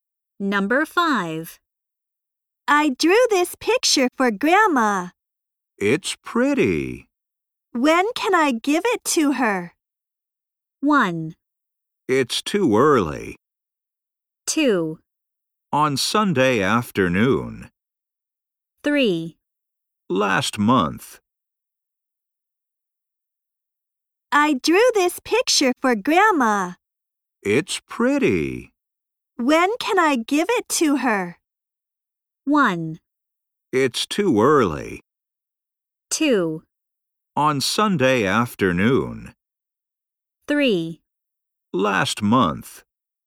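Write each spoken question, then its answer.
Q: When can I give it to her?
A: 2: On Sunday afternoon.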